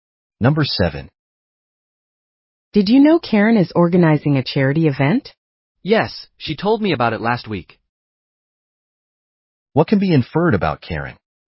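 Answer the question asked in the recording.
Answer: She told the woman about the charity event last week.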